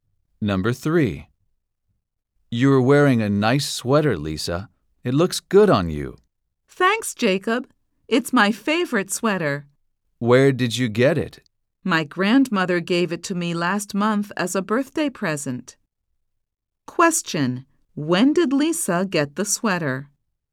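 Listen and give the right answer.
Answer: Last month, as a birthday present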